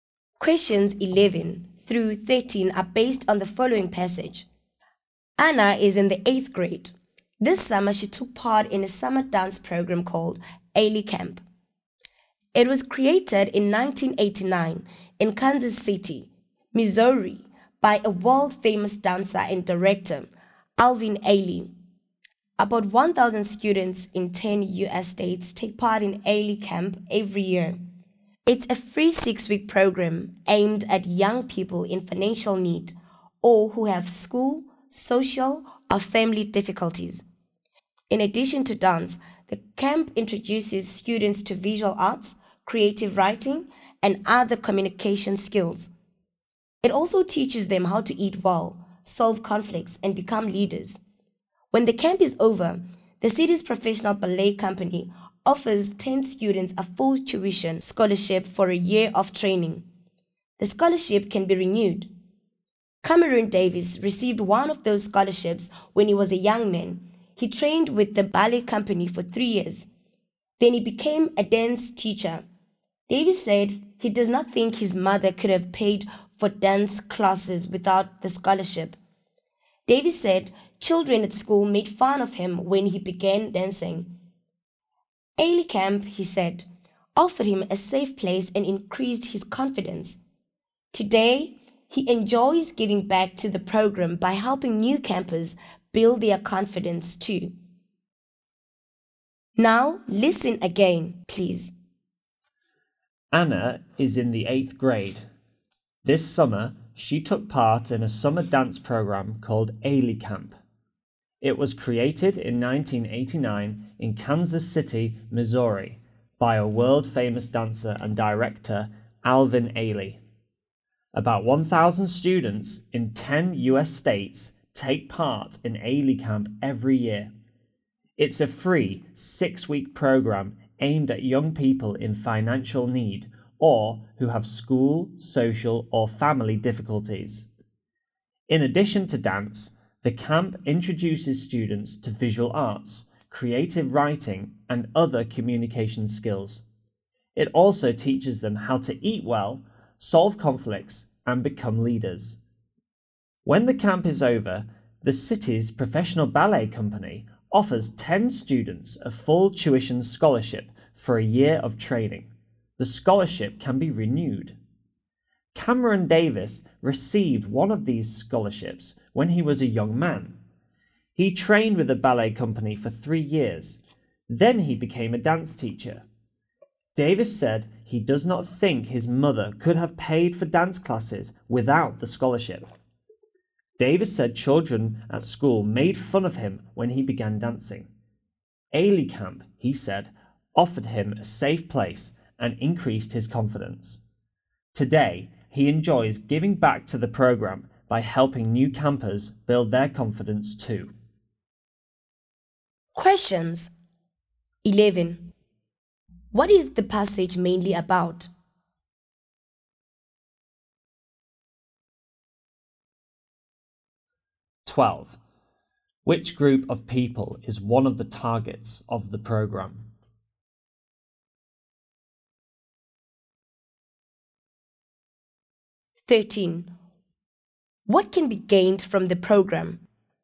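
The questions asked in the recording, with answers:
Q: What is the passage mainly about?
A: Ailey Camp, a free summer dance program

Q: Which group of people is one of the targets of the program?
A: Young people in financial need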